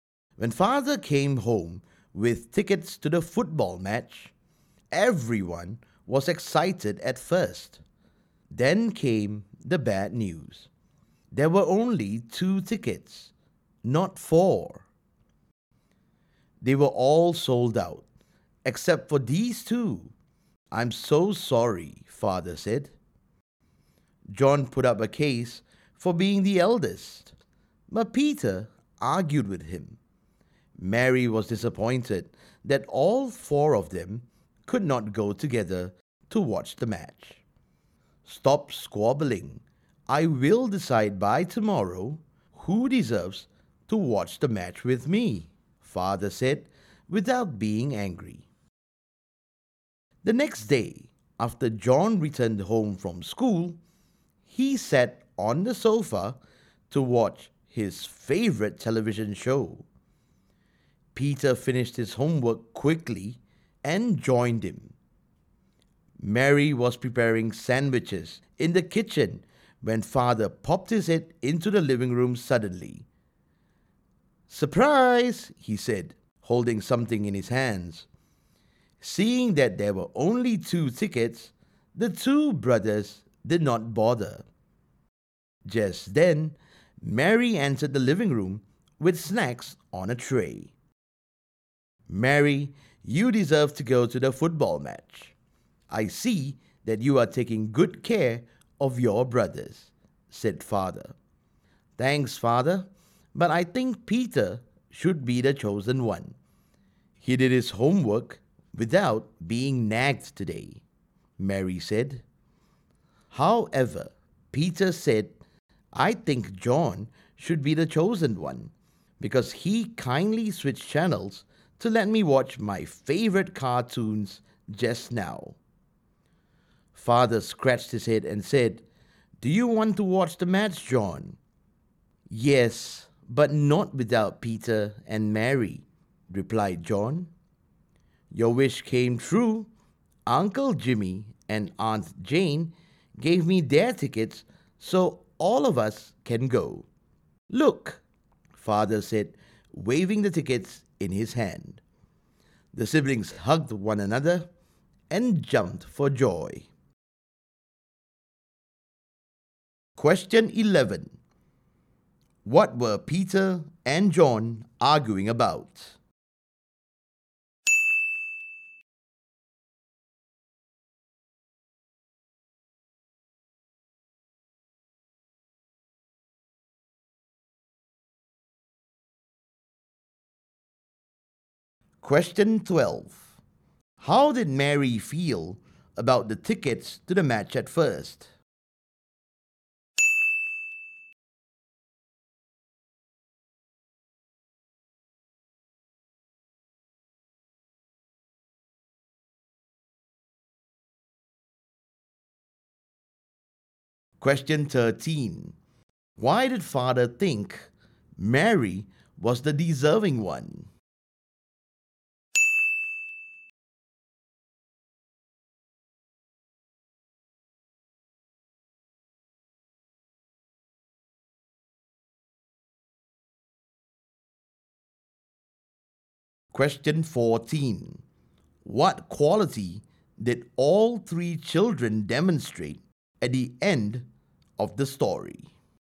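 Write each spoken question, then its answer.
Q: What were Peter and John arguing about?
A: Who should get a ticket to go to the football match with Father

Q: How did Mary feel about the tickets to the match at first?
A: Disappointed

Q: Why did Father think Mary was the deserving one?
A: She was taking good care of her brothers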